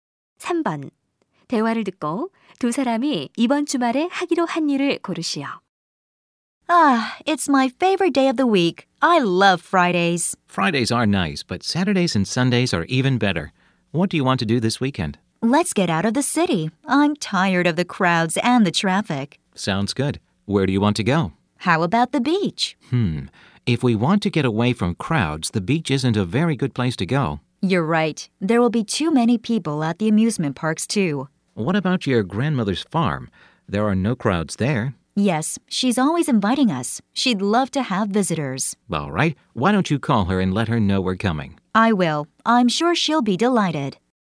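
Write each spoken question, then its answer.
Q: 대화를 듣고 두 사람이 이번 주말에 하기로 한 일을 고르시오.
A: 할머니 농장 방문하기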